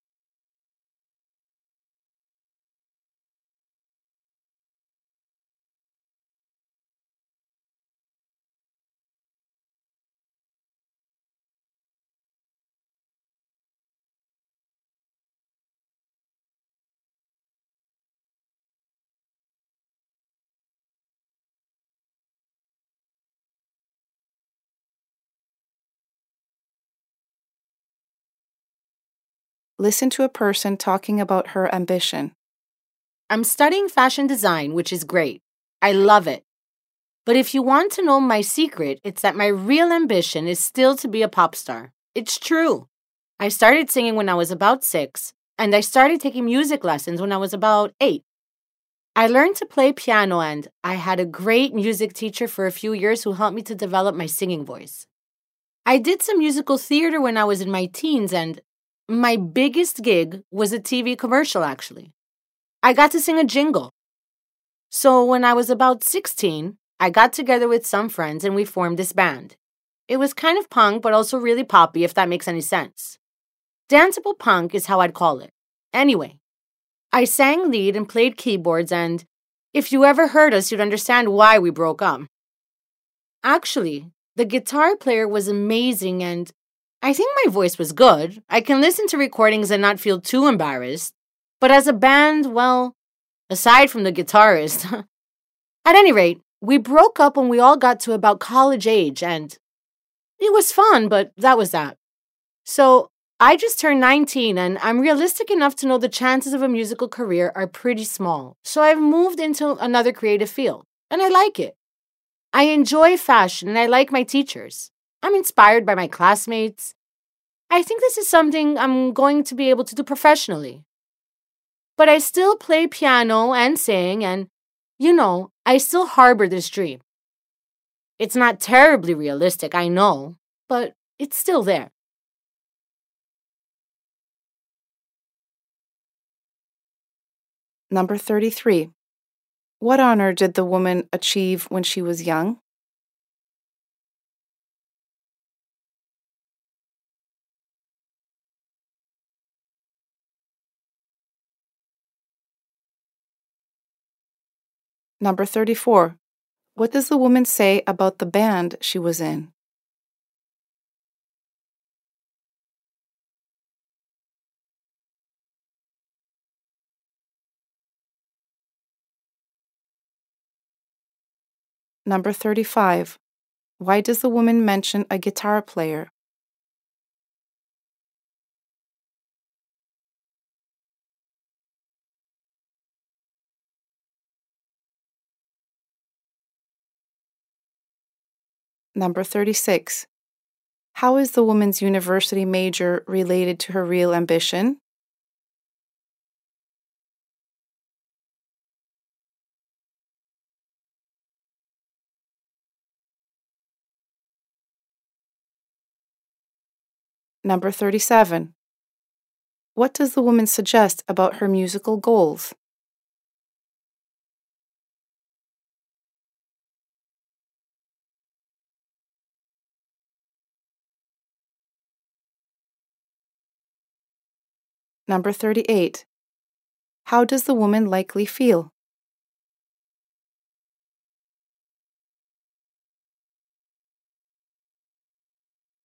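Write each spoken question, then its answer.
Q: What honor did the woman achieve when she was young?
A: She sang a jingle in a TV commercial

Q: What does the woman say about the band she was in?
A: It wasn't very good, and it broke up

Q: Why does the woman mention a guitar player?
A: To say he was the one really good member of the band

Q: How is the woman's university major related to her real ambition?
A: Both are creative fields

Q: What does the woman suggest about her musical goals?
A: She still dreams of being a pop star but knows it's unrealistic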